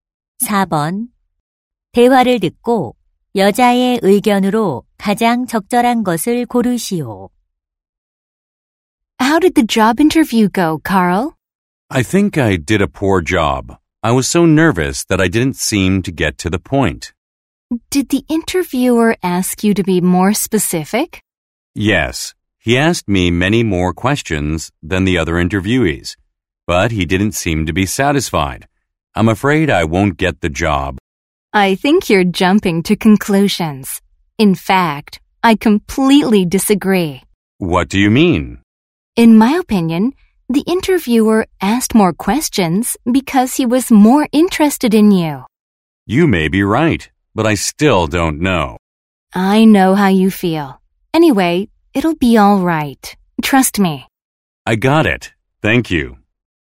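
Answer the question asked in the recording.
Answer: 면접관이 질문을 많이 한 것은 지원자에게 관심이 있다는 뜻이다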